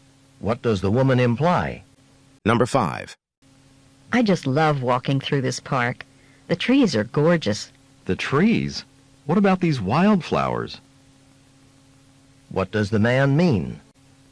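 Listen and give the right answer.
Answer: The wildflowers are even more beautiful than the trees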